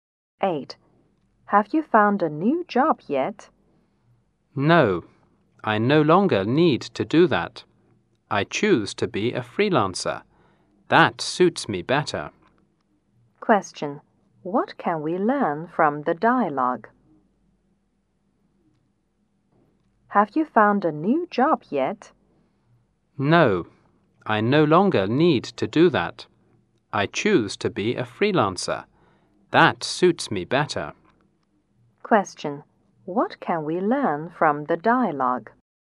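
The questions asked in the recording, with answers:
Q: What can we learn from the dialogue?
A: The man has decided to be a freelancer instead of finding a new job.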